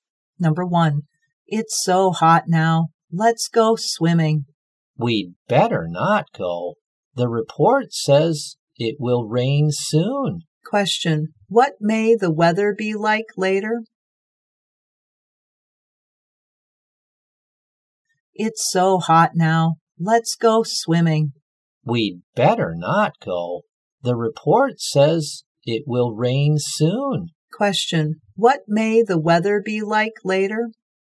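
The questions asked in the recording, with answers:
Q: what may the weather be like later?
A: Rainy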